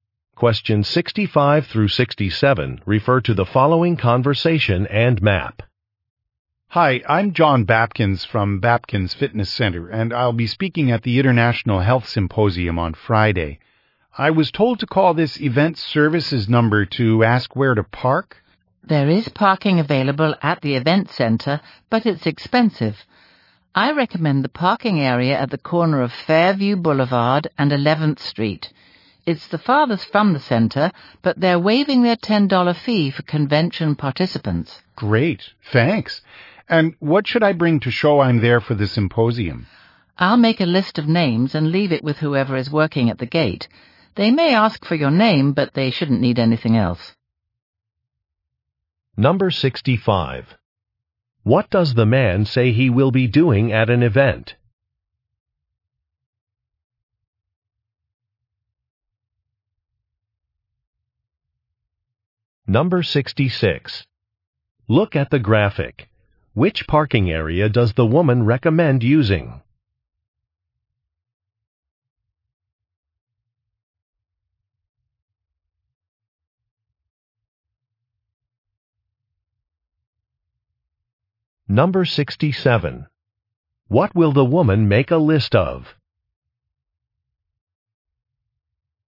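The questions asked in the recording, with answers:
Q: What does the man say he will be doing at an event?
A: Speaking at the symposium

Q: What will the woman make a list of?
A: Names of participants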